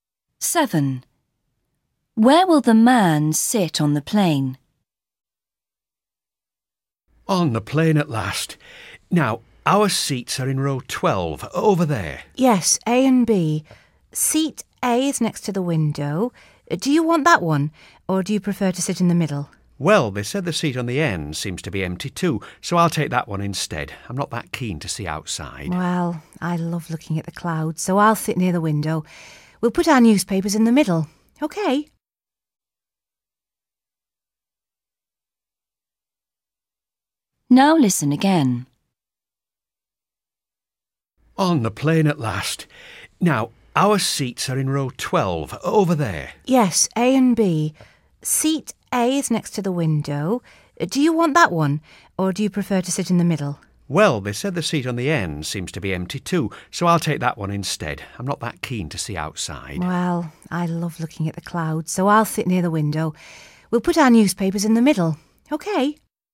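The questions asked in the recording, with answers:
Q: Where will the man sit on the plane?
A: in the seat on the end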